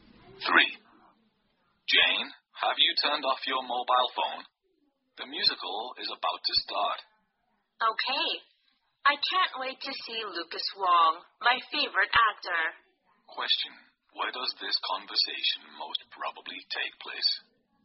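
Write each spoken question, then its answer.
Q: Where does this conversation most probably take place?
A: In a theater.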